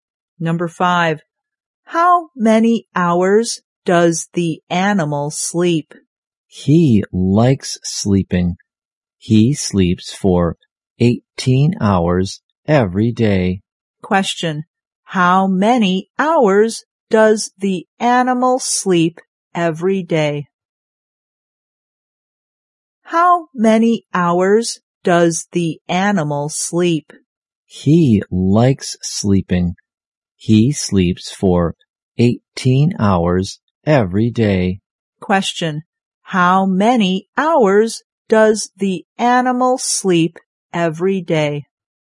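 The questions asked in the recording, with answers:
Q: how many hours does the animal sleep every day?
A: 18 hours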